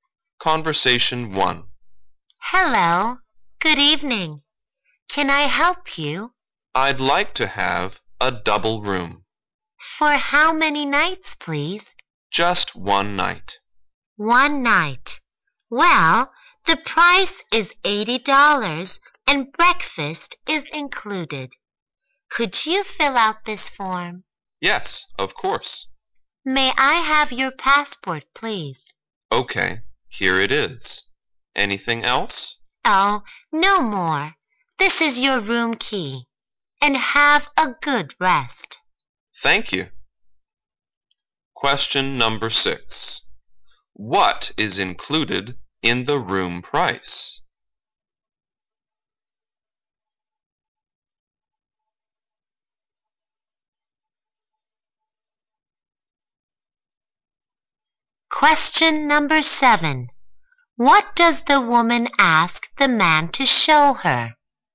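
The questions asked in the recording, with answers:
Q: What is included in the room price?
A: Breakfast

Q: What does the woman ask the man to show her?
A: His passport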